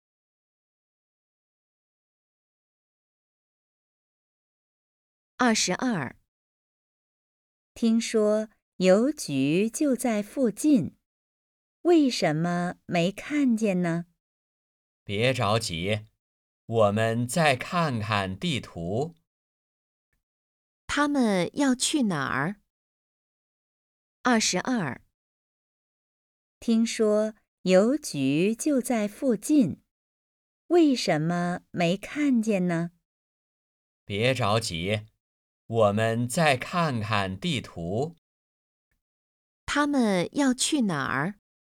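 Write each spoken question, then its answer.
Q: 他们要去哪儿?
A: 邮局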